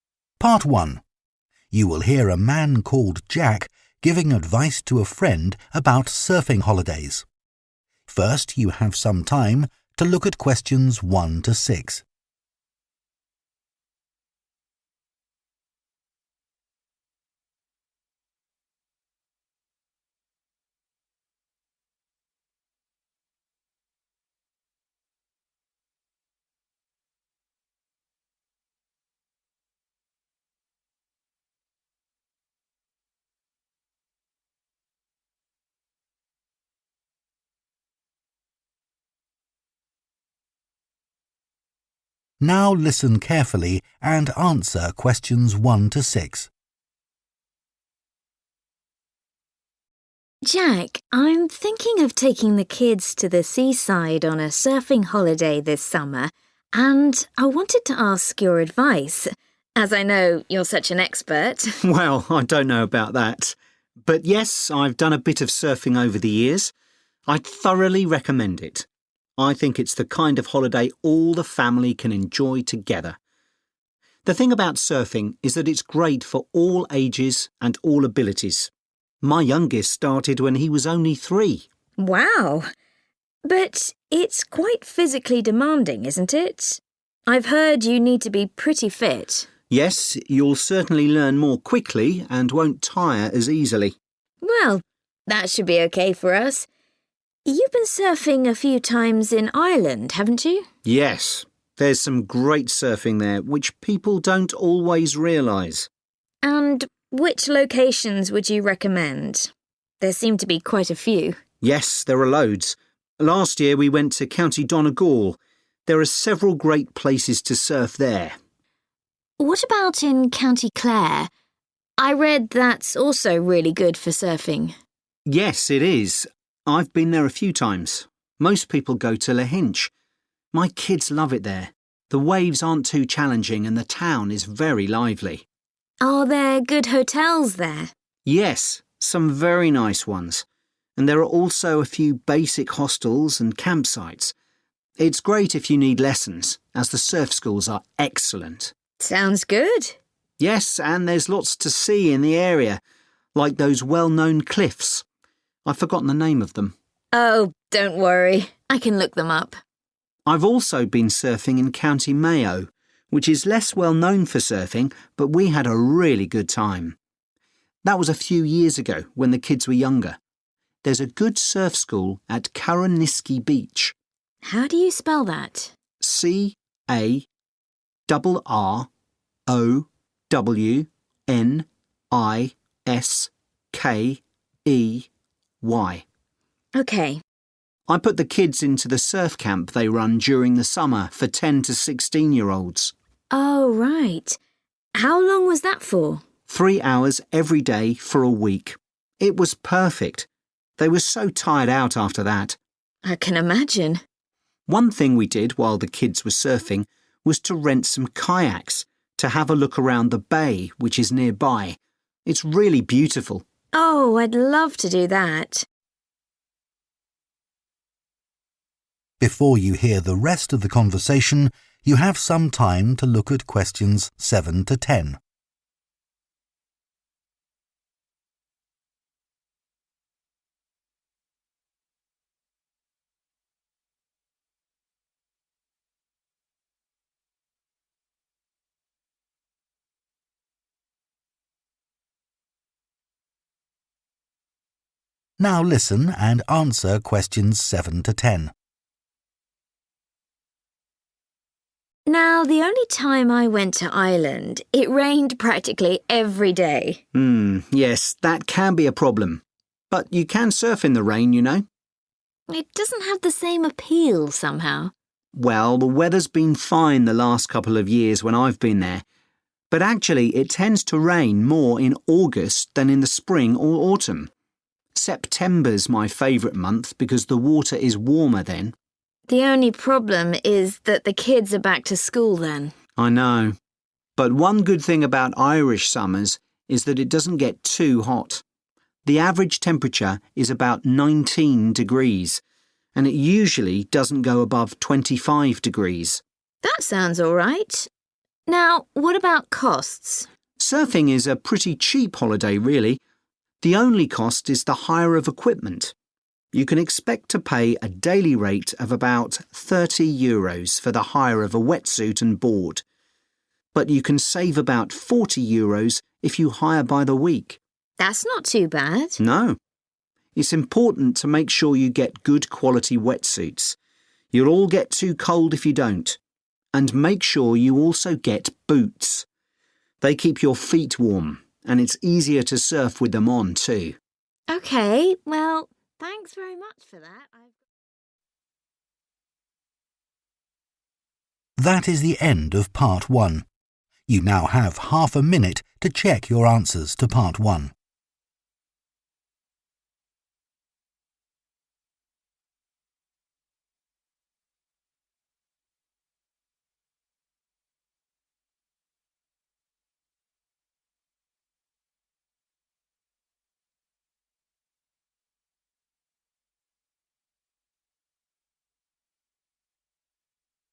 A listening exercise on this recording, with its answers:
Complete the notes below. Write ONE WORD AND/OR A NUMBER for each answer.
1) Recommends surfing for 1 holidays in the summer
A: family

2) Need to be quite 2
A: fit

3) Lahinch has some good quality 3 and surf schools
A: hotels

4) Good surf school at 4 beach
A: Carrowniskey

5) Surf camp lasts for one 5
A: week

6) Can also explore the local 6 by kayak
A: bay

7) Best month to go: 7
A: September

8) Average temperature in summer: approx. 8 degrees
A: 19 / nineteen

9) Wetsuit and surfboard: 9 euros per day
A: 30 / thirty

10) Also advisable to hire 10 for warmth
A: boots